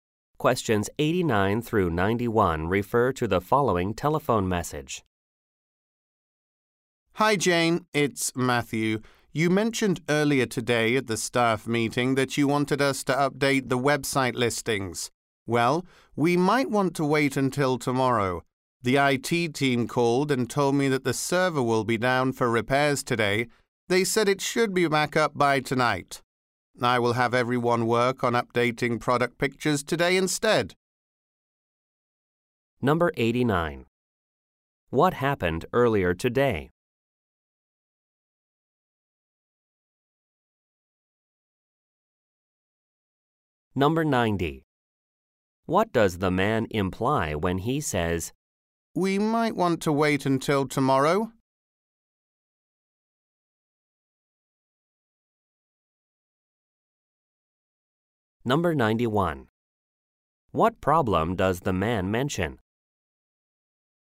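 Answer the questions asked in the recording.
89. A staff meeting
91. The server will be down for repairs today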